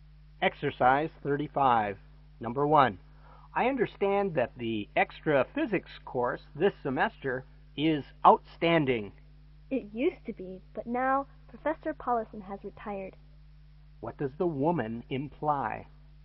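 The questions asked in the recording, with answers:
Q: What does the woman imply?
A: The course isn't as good anymore now that Professor Paulison has retired.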